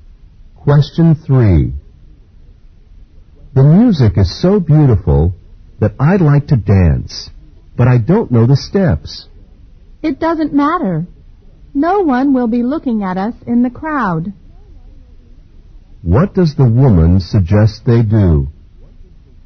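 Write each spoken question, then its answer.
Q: What does the woman suggest they do?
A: Dance anyway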